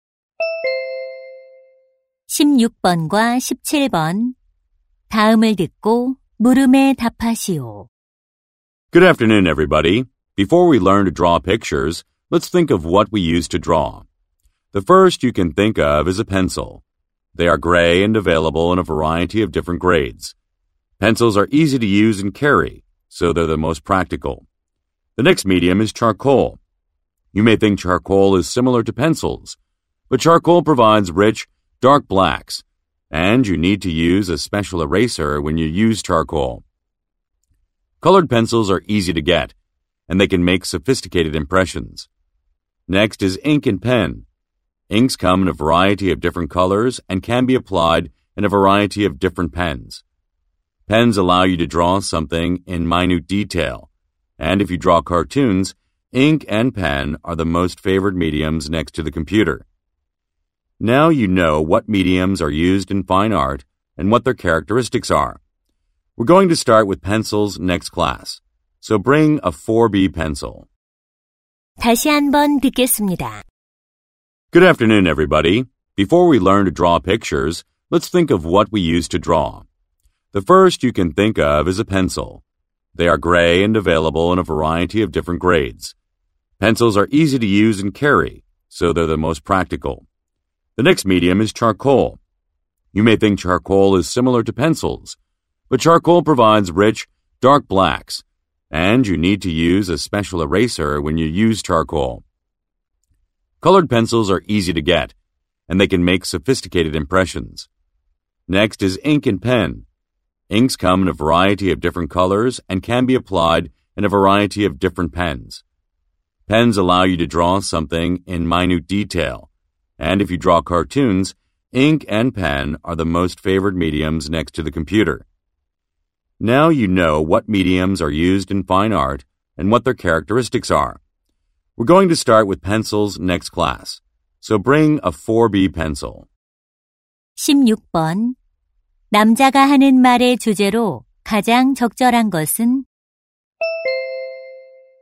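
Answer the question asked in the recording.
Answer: 그림 그리는 데 쓰는 도구(재료)의 종류와 특징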